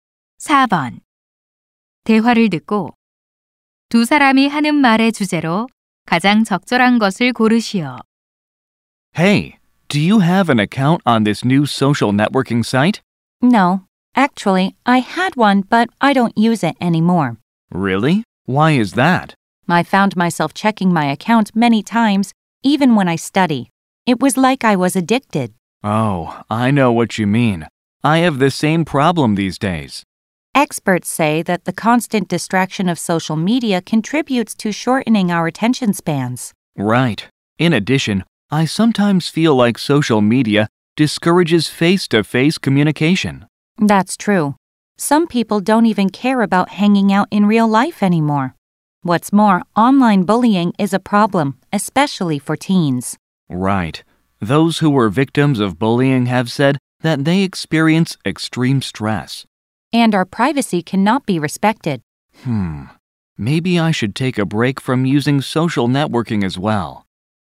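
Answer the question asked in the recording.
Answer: 소셜 미디어 사용의 부정적 영향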